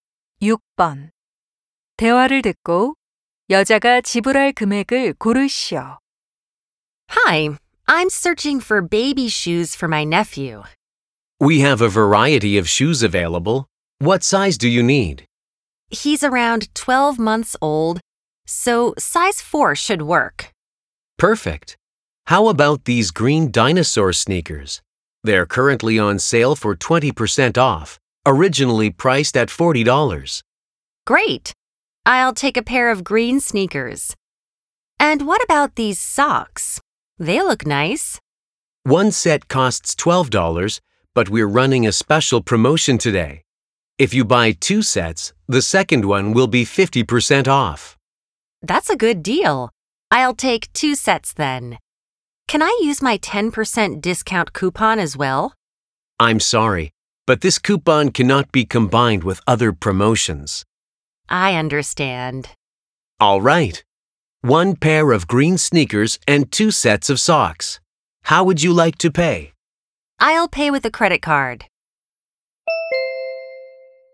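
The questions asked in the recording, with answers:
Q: 대화를 듣고 여자가 지불할 금액을 고르시오.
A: 50달러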